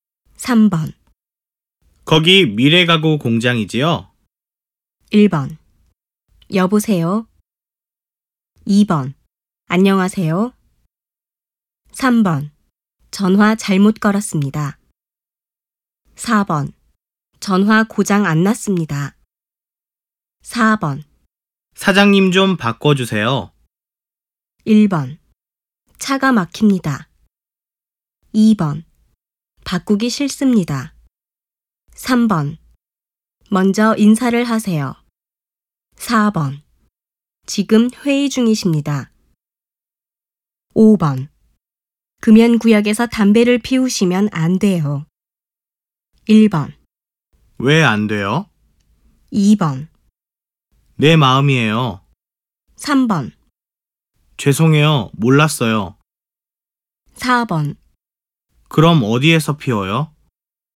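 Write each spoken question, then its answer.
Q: 사장님 좀 바꿔주세요.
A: 4: 지금 회의 중이십니다.

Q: 금연구역에서 담배를 피우시면 안 돼요.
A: 3: 죄송해요. 몰랐어요.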